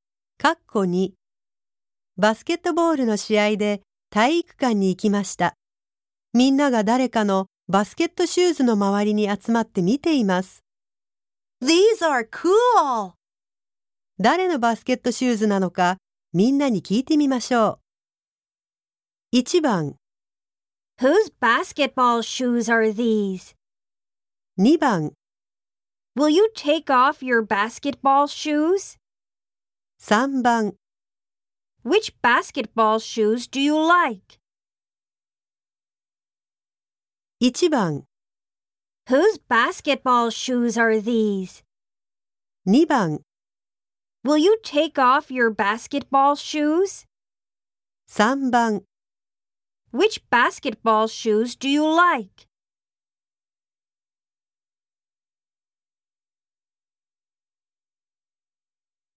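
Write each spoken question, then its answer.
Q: 誰のバスケットシューズなのかみんなに聞いてみましょう。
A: 1: Whose basketball shoes are these?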